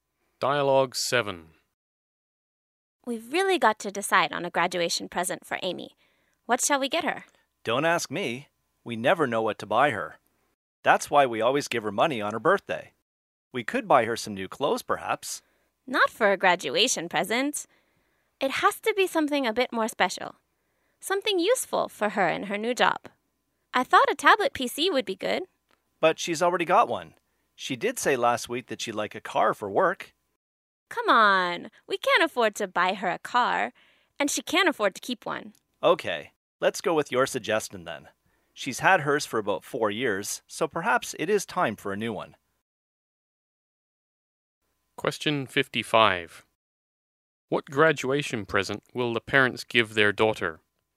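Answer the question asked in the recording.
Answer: A tablet PC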